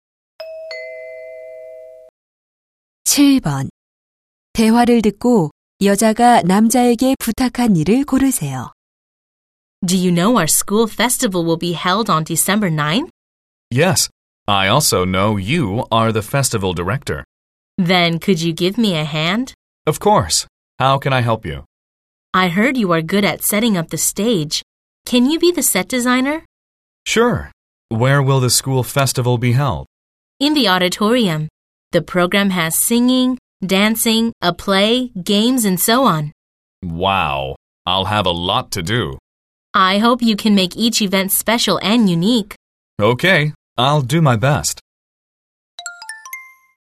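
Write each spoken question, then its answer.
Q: 대화를 듣고 여자가 남자에게 부탁한 일을 고르세요.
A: 무대 디자이너 맡기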